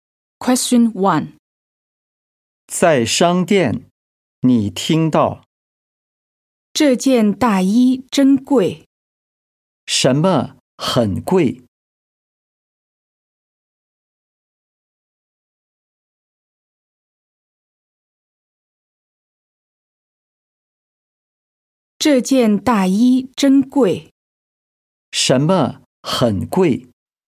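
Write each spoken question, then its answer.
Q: 什么很贵?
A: 这件大衣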